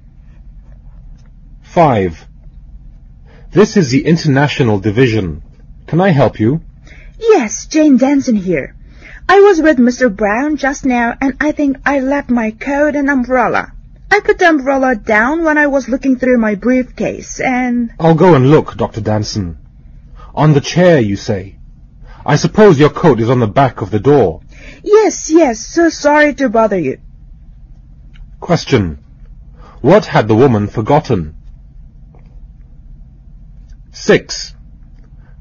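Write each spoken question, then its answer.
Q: What had the woman forgotten?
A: Her coat and umbrella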